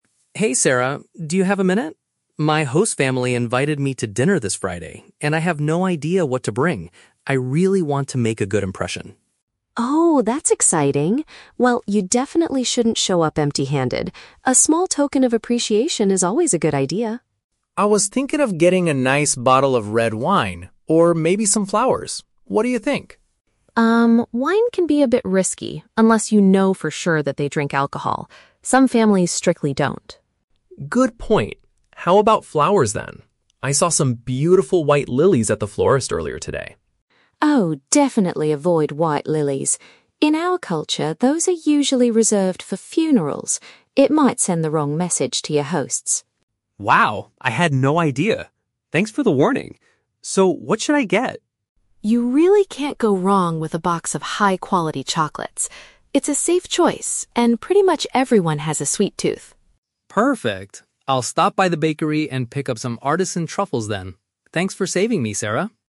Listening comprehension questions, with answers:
Listen to the conversation between an international student and his friend. Choose the correct answer (A, B, or C) for each question.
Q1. Why does Sarah advise Ken against bringing wine?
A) It is generally too expensive for a student to buy.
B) The host family might not consume alcoholic beverages.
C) They specifically requested a non-alcoholic drink.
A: B) The host family might not consume alcoholic beverages.

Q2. What is the cultural issue with the white lilies?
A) They are traditionally linked to death and mourning.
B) They are considered too romantic for this occasion.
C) They are currently out of stock at the local florist.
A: A) They are traditionally linked to death and mourning.

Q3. What will Ken ultimately purchase for his host family?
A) A freshly baked cake.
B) A colorful floral arrangement.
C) Some premium sweet treats.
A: C) Some premium sweet treats.

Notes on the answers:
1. Sarah says wine is risky because some families "don't drink alcohol" (which means they might not consume alcoholic beverages). Option (A) is a plausible guess for a student, but it is not mentioned. Option (C) is a trap; the family didn't request anything.
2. Sarah warns Ken that white lilies are "reserved for funerals", which is a time of death and mourning. Option (B) is plausible for other types of flowers (like red roses) but not mentioned here. Option (C) is a trap: Ken actually says he "saw some beautiful white lilies at the florist", meaning they are in stock.
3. Ken decides to buy "high-quality chocolates" and "artisan truffles", which are premium sweet treats. Option (A) is a trap: Ken mentions going to the "bakery", but he is buying truffles, not a cake. Option (B) is a trap because flowers were mentioned but completely rejected.

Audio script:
Ken: Hey Sarah, do you have a minute? My host family invited me to dinner this Friday, and I have no idea what to bring. I really want to make a good impression.
Sarah: Oh, that's exciting! Well, you definitely shouldn't show up empty-handed. A small token of appreciation is always a good idea.
Ken: I was thinking of getting a nice bottle of red wine, or maybe some flowers. What do you think?
Sarah: Um, wine can be a bit risky unless you know for sure that they drink alcohol. Some families strictly don't.
Ken: Good point. How about flowers then? I saw some beautiful white lilies at the florist earlier today.
Sarah: Oh, definitely avoid white lilies! In our culture, those are usually reserved for funerals. It might send the wrong message to your hosts.
Ken: Wow, I had no idea! Thanks for the warning. So, what should I get?
Sarah: You really can't go wrong with a box of high-quality chocolates. It's a safe choice, and pretty much everyone has a sweet tooth.
Ken: Perfect! I'll stop by the bakery and pick up some artisan truffles then. Thanks for saving me, Sarah!

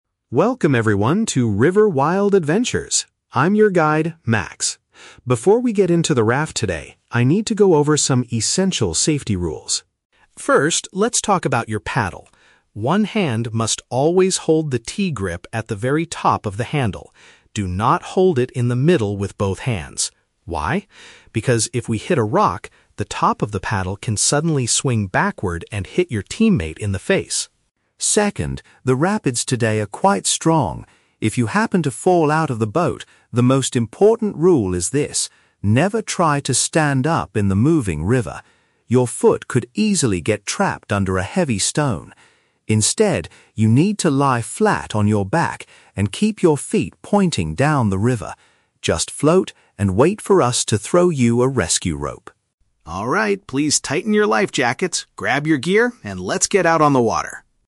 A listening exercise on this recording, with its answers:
Listen to the river guide giving a safety briefing. Choose the correct answer (A, B, or C) for each question.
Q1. How should participants hold their paddles?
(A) By keeping one hand at the highest point of the equipment.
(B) By placing both hands together in the center of the shaft.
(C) By resting the handle firmly against their life jackets.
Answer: (A) By keeping one hand at the highest point of the equipment.

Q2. Why does the guide emphasize the rule about holding the paddle?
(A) To make sure the raft moves quickly through the strong rapids.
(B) To avoid losing the equipment if it strikes a large rock.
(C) To prevent participants from accidentally injuring other people.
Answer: (C) To prevent participants from accidentally injuring other people.

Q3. What is the strictly forbidden action if someone falls into the water?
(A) Attempting to stand up on the bottom of the river.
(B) Floating on their back and waiting for a rescue rope.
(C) Pointing their feet in the direction the water is flowing.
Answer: (A) Attempting to stand up on the bottom of the river.

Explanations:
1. The guide instructs, "One hand must always hold the T-grip at the very top of the handle." Option A is a perfect paraphrase: "highest point of the equipment" means the very top of the handle. Why the traps are wrong: Option B is the exact opposite of the instruction ("Do not hold it in the middle with both hands"). Option C is never mentioned in the audio.
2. The guide explains that if you hold it wrong and hit a rock, the paddle can "hit your teammate in the face." This means the rule is there to prevent injuring other people. Why the traps are wrong: Option A is a plausible reason for a rowing technique, but not the safety reason given here. Option B is a trap; the audio mentions hitting a rock, but the danger is hurting a teammate, not losing the paddle.
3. The question asks for the "strictly forbidden action" (what you must NOT do). The guide explicitly states, "never try to stand up in the moving river." Attempting to stand up matches option A. Why the traps are wrong: Options B and C are the correct actions that the guide tells the participants to do ("lie flat on your back", "keep your feet pointing down the river"), so they are not forbidden.

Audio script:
Max (Guide): Welcome everyone to River Wild Adventures! I'm your guide, Max. Before we get into the raft today, I need to go over some essential safety rules.
First, let's talk about your paddle. One hand must always hold the T-grip at the very top of the handle. Do not hold it in the middle with both hands. Why? Because if we hit a rock, the top of the paddle can suddenly swing backward and hit your teammate in the face.
Second, the rapids today are quite strong. If you happen to fall out of the boat, the most important rule is this: never try to stand up in the moving river. Your foot could easily get trapped under a heavy stone. Instead, you need to lie flat on your back and keep your feet pointing down the river. Just float and wait for us to throw you a rescue rope.

